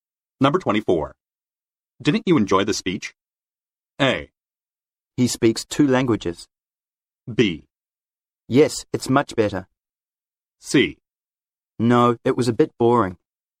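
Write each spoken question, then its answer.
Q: Didn't you enjoy the speech?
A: C: No, it was a bit boring.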